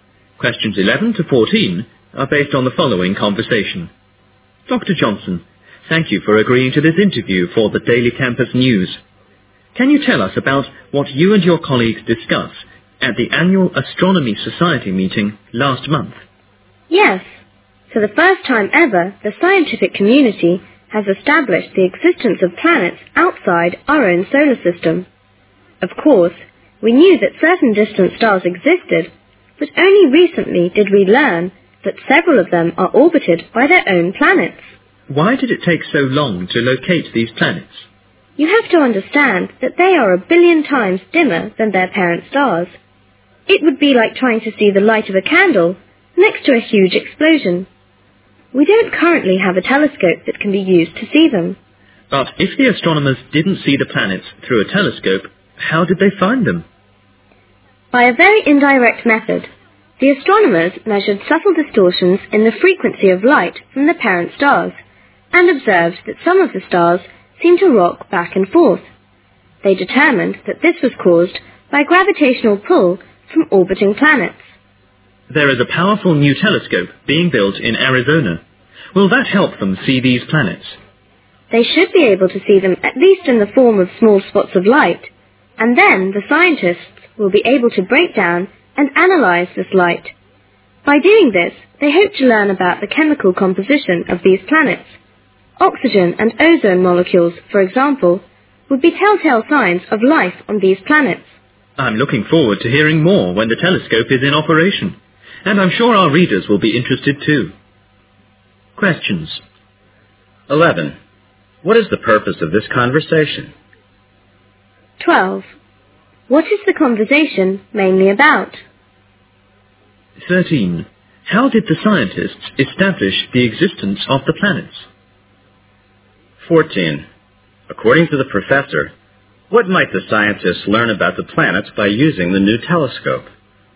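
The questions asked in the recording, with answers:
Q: What is the purpose of this conversation?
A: An interview with Dr. Johnson for the Daily Campus News

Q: What is the conversation mainly about?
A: The discovery of planets outside our solar system

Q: How did the scientists establish the existence of the planets?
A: Indirectly, by measuring distortions in the light of parent stars that seemed to rock back and forth

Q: According to the professor, what might the scientists learn about the planets by using the new telescope?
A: Their chemical composition, and possible signs of life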